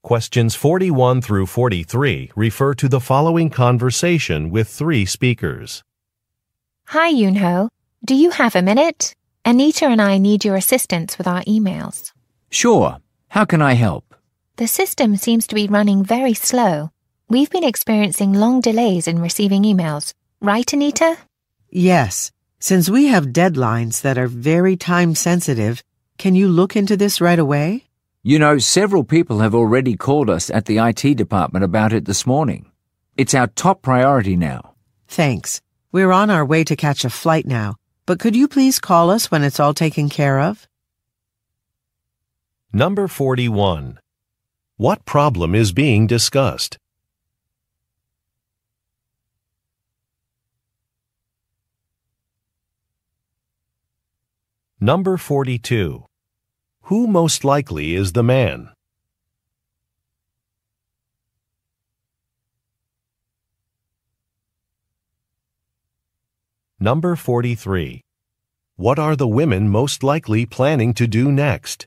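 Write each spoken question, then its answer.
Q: What problem is being discussed?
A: Emails are arriving with long delays because the system is slow.

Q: Who most likely is the man?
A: An IT department worker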